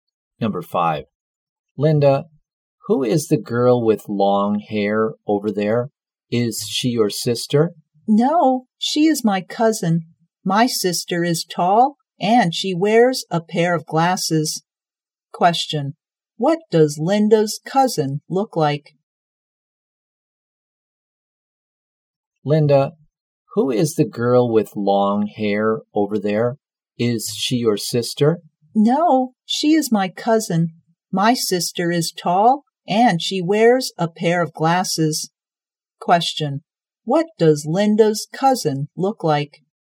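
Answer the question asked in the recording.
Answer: She has long hair.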